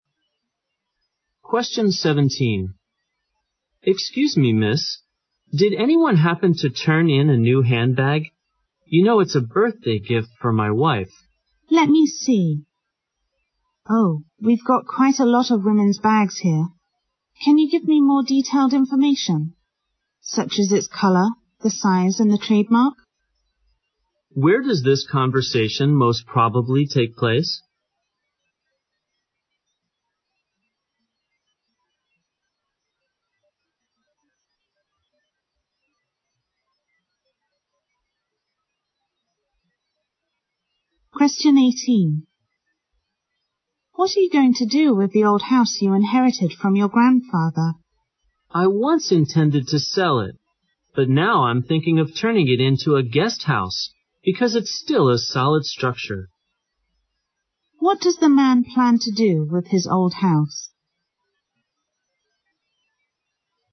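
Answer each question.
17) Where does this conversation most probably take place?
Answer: At a "Lost and Found".

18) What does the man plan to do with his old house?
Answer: Convert it into a hotel.

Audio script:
17
M: Excuse me, Miss?Did anyone happen to turn in a new handbag? You know, it's a birthday gift for my wife.
W: Let me see. Oh, we've got quite a lot of women's bags here. Can you give me more detailed information, such as the color, the size and the trademark?
Q: Where does this conversation most probably take place?
18
M: What are you going to do with the old house you are in heritage from your grandfather?
W: I once intended to sell it, but now, I'm thinking of turning it into a guest house, because it's still a solid structure.
Q: What does the man plan to do with his old house?

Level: 六级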